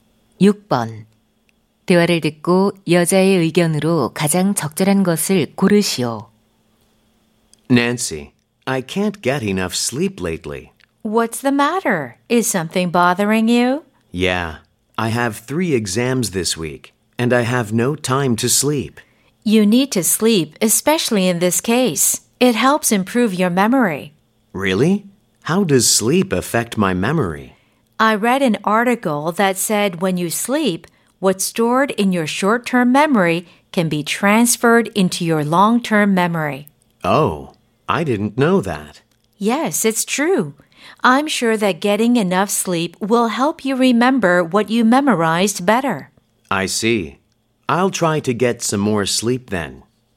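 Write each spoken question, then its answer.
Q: 대화를 듣고 여자의 의견으로 가장 적절한 것을 고르시오.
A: 충분한 수면은 기억력 향상에 도움이 된다.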